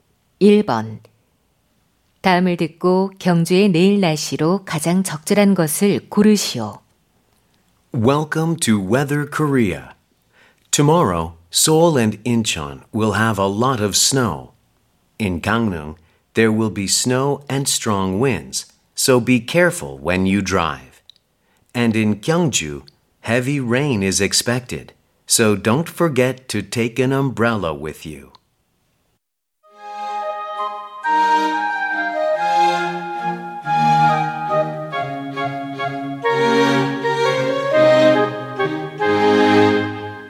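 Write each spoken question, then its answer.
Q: 다음을 듣고 경주의 내일 날씨로 가장 적절한 것을 고르시오.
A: 많은 비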